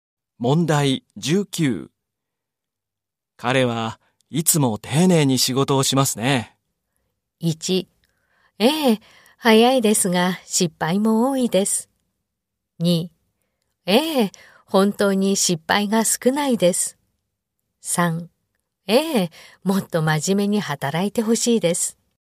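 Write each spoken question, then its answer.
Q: 彼はいつも丁寧に仕事をしますね。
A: 2: ええ、本当に失敗が少ないです。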